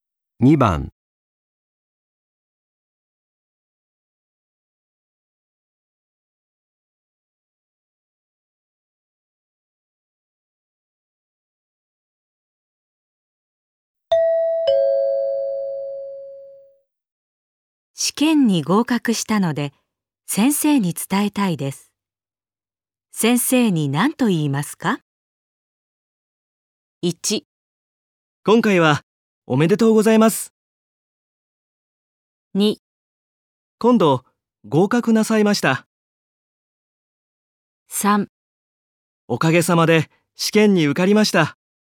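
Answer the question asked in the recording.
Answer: 3: おかげさまで試験に受かりました。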